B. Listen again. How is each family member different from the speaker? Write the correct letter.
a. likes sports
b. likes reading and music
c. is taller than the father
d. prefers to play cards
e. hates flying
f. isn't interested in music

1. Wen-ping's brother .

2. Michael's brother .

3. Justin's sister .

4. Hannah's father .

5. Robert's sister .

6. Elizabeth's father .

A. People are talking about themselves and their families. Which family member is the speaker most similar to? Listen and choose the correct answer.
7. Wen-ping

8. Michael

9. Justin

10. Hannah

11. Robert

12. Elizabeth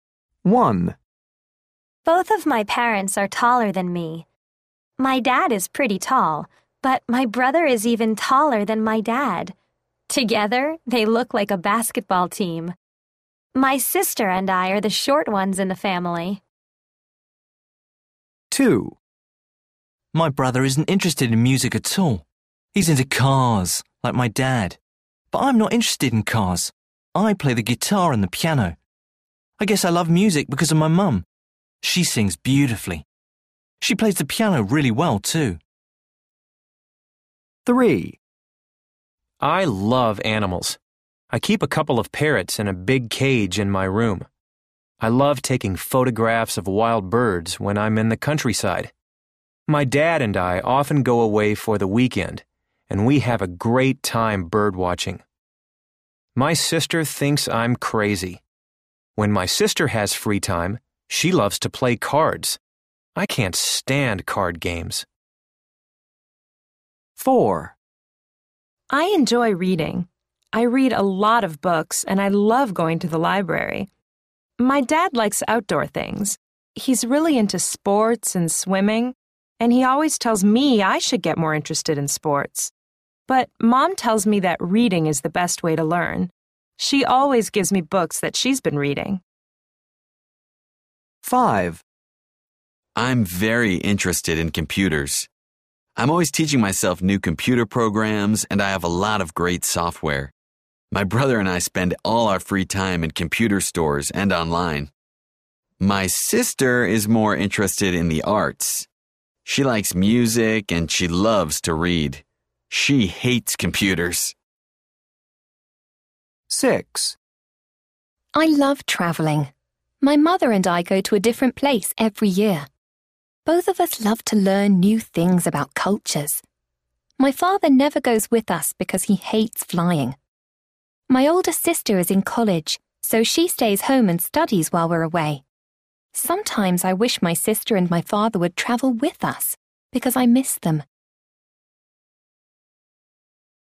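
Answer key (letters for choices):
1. c
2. f
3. d
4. a
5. b
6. e
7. his/her sister
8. his mum
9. his dad
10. her mom
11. his brother
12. her mother

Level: Luyện nghe trình độ A1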